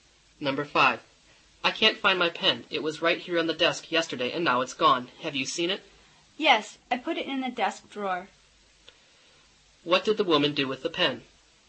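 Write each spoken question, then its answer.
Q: What did the woman do with the pen?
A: She put it in the desk drawer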